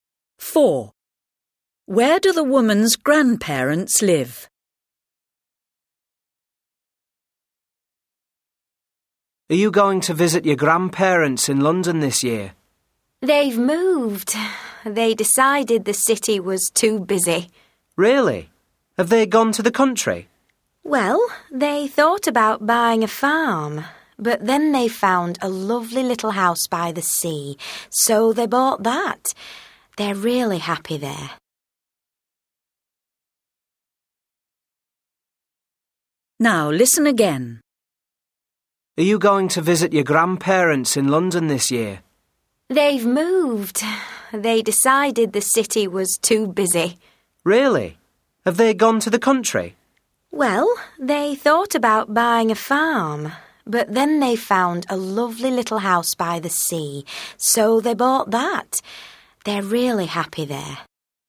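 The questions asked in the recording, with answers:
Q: Where do the woman's grandparents live?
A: In a little house by the sea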